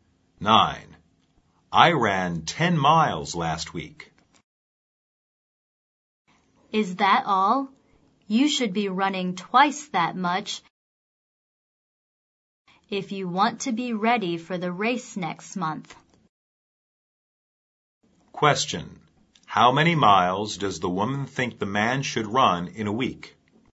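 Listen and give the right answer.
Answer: 20 miles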